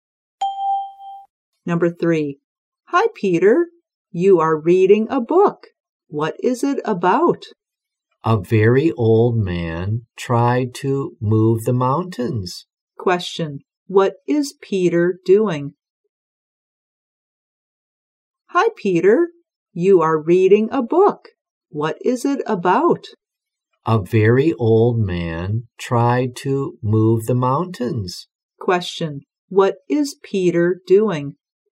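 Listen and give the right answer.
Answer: Reading a book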